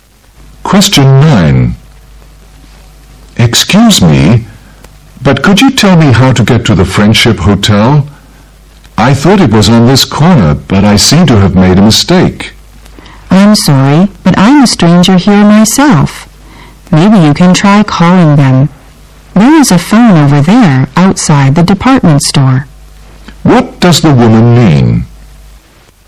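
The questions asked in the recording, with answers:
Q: What does the woman mean?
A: She doesn't know the way either, since she is a stranger there; he could call the hotel.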